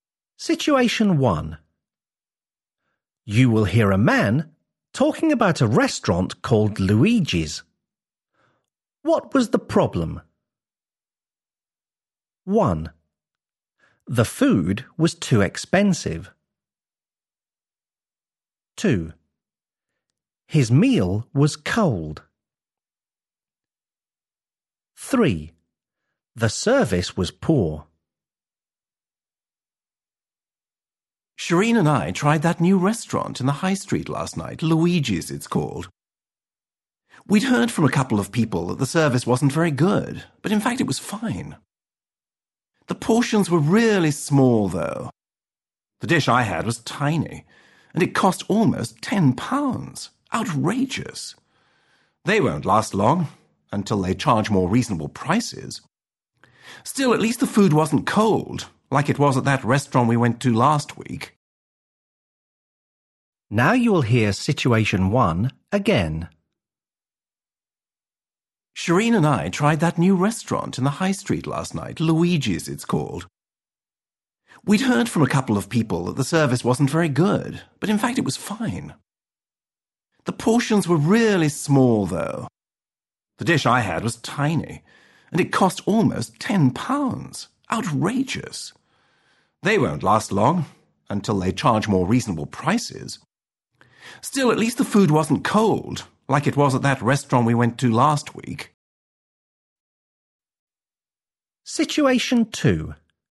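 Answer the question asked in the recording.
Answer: 1: The food was too expensive.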